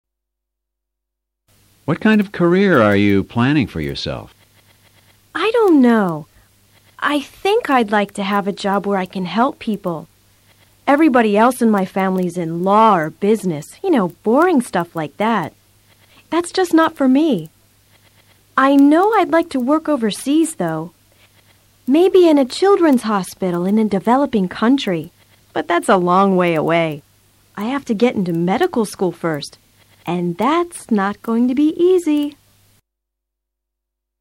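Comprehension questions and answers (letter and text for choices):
A continuación escucharás a tres entrevistadores. Escucha atentamente sus consultas y selecciona luego las alternativas más adecuadas de acuerdo con tu comprensión auditiva.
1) She wants a career which involves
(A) studying business or law.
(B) helping people.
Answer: (B) helping people.

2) She would like to work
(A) in a foreign country.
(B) in a children's hospital downtown.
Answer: (A) in a foreign country.

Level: Nivel Intermedio a Intermedio Alto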